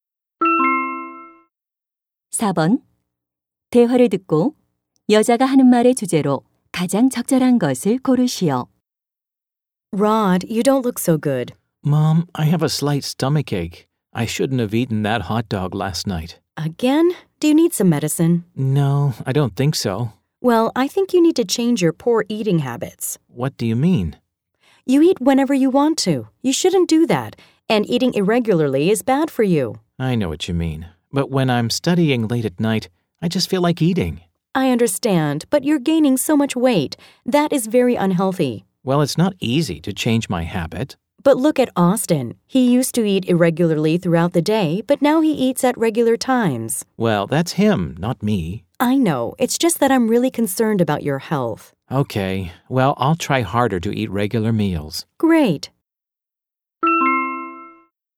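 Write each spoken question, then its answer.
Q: 대화를 듣고 여자가 하는 말의 주제로 가장 적절한 것을 고르시오.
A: 규칙적인 식습관의 중요성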